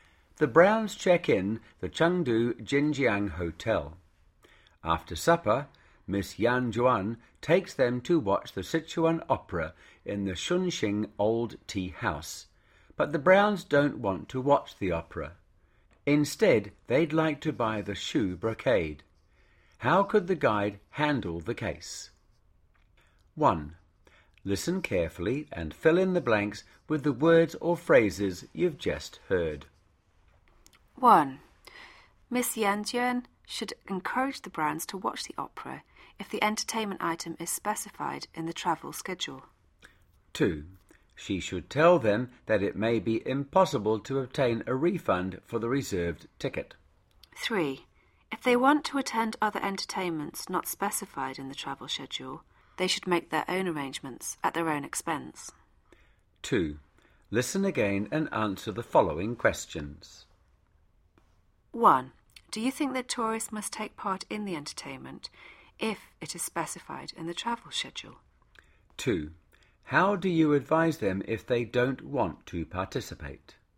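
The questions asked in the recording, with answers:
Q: How do you advise them if they don't want to participate?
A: Tell them they may not get a refund for the reserved ticket, and that they must arrange and pay for any other entertainment themselves.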